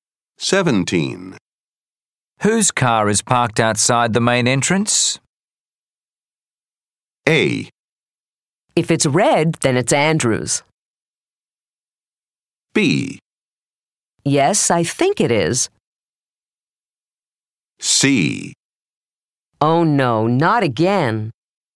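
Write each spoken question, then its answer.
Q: Whose car is parked outside the main entrance?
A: A: If it's red, then it's Andrew's.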